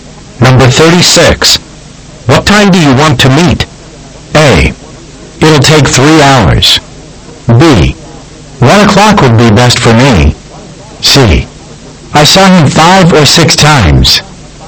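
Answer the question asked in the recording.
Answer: B: 1 o'clock would be best for me.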